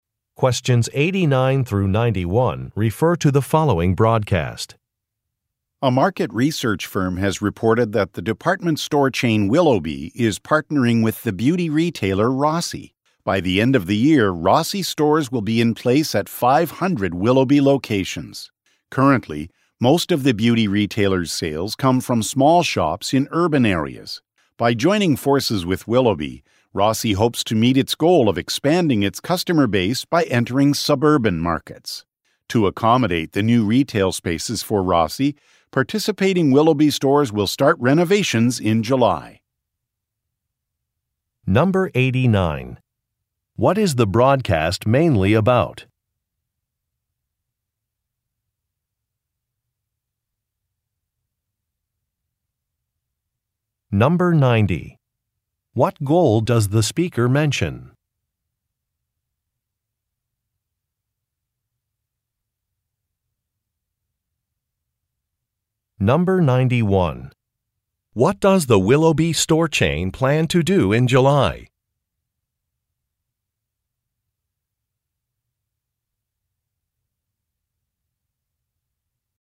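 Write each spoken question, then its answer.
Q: What is the broadcast mainly about?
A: A partnership between Willoughby department stores and the beauty retailer Rossi

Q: What goal does the speaker mention?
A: Expanding Rossi's customer base by entering suburban markets

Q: What does the Willoughby store chain plan to do in July?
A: Start renovations to make room for Rossi stores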